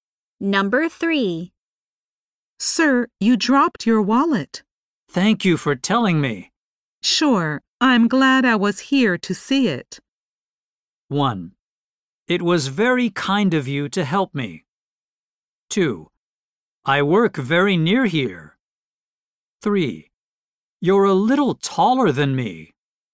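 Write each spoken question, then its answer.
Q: Sure, I'm glad I was here to see it.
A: 1: It was very kind of you to help me.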